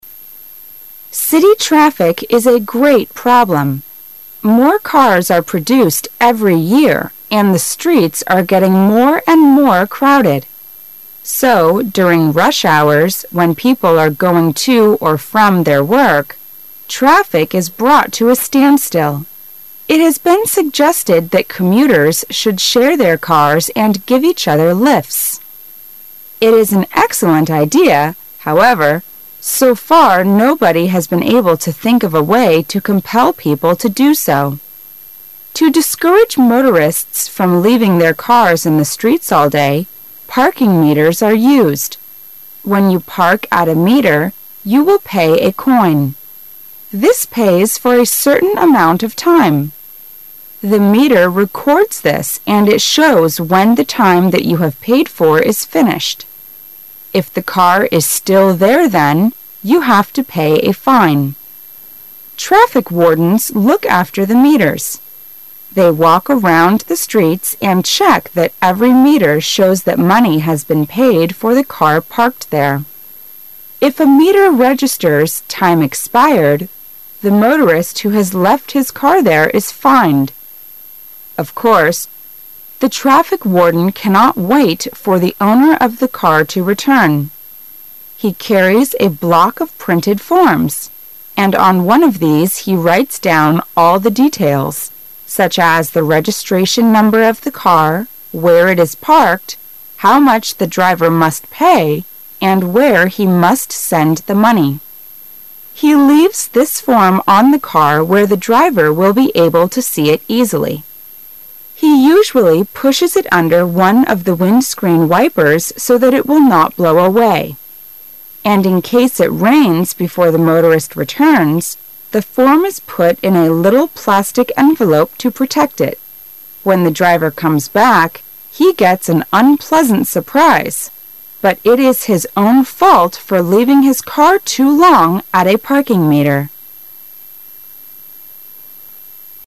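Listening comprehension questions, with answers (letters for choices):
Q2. What are parking meters used to?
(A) To limit the numbers of cars parked in the streets.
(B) To prevent cars parked in the street from being stolen.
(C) To make it convenient for drivers to pay the fee.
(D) To limit the time of cars left in the streets.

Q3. What will happen if the parking meter registers" time expired"?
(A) The car will be pushed away by policemen.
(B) The driver's license will be withdrawn.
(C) The owner of the car will be fined.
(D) The traffic wardens will drive the car away.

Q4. How do the traffic wardens protect the form they give to the motorist from rain?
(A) They put the form in a little plastic envelope.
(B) They put the form under one of the windscreen wipers.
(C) They wait there until the motorist returns.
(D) They will ask the motorist to go to their office for the form.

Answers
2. 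D
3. C
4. A

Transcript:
[解析] 17-20 City traffic is a great problem. More cars are produced every year and the streets are getting more and more crowded. So during" rush hours", when people are going to or from their work, traffic is brought to a standstill. It has been suggested that commuters should share their cars and give each other lifts. It is an excellent idea, however, so far nobody has been able to think of a way to compel people to do so. To discourage motorists from leaving their cars in the streets all day, parking meters are used. When you park at a meter, you will pay a coin. This pays for a certain amount of time. The meter re cords this and it shows when the time that you have paid for is finished. If the car is still there then, you have to pay a fine. Traffic wardens look after the meters. They walk around the streets and check that every meter shows that money has been paid for the car parked there. 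If a meter registers" time expired", the motorist who has left his car there is fined. Of course, the traffic :warden cannot wait for the owner of car to return. He carries a block of printed forms, and on one of these he writes down all the details, such as the registration number of the car, where it is parked, how much the driver must pay and where he must send the money. He leaves this form on the car where the driver will be able to see it easily; he usually pushes it under one of the windscreen wipers so that it will not blow away. And in case it rains before the motorist returns, the form is put in a little plastic envelope to protect it. When the driver comes back, he gets an unpleasant surprise, but it is his own fault for leaving his car too long at a parking meter.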